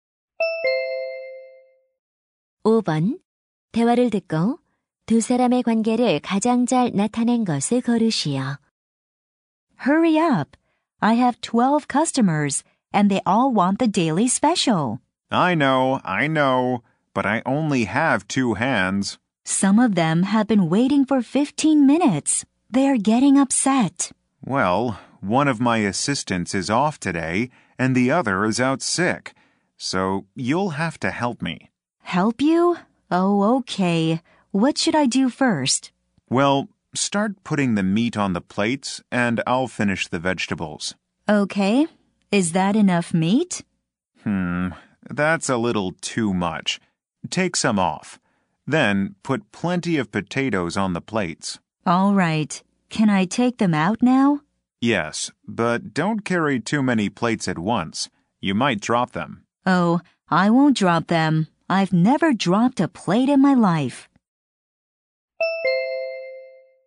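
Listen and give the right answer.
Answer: 요리사와 종업원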